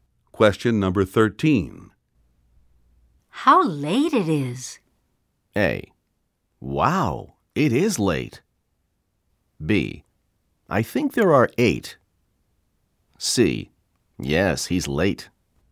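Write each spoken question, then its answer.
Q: How late it is.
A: A: Wow, it is late.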